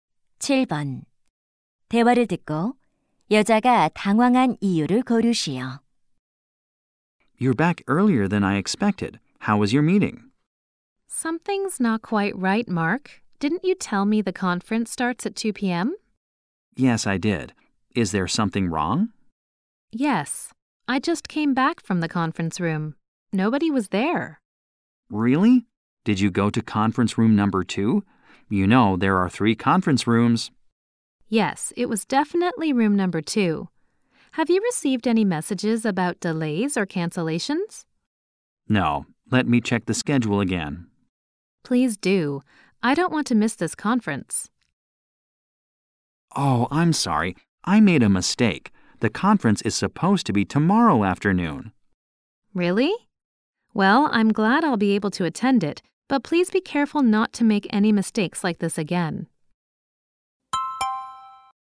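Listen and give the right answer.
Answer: 회의실에 아무도 없어서 (회의 날짜가 잘못 전달됨)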